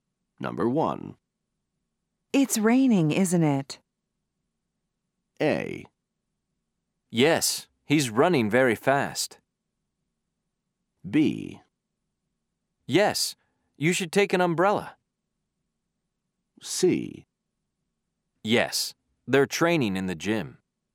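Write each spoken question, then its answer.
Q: It's raining, isn't it?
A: B: Yes, you should take an umbrella.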